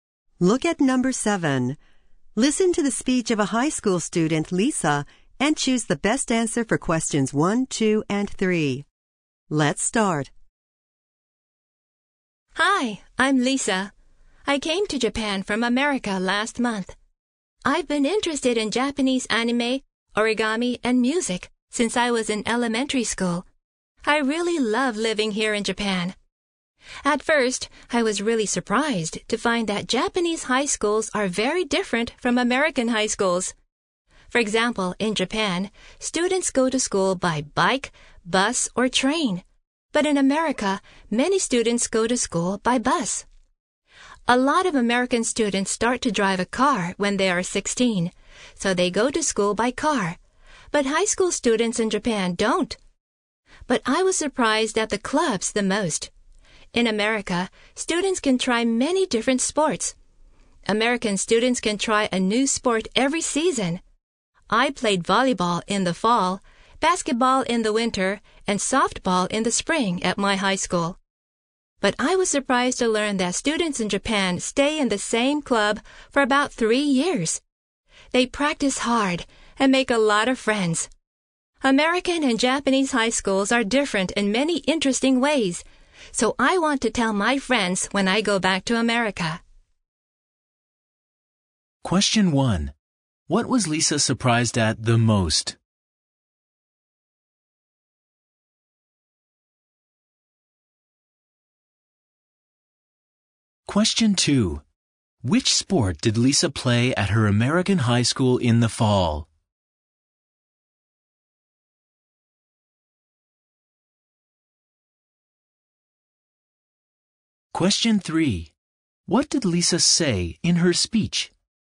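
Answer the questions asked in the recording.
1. The clubs
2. Volleyball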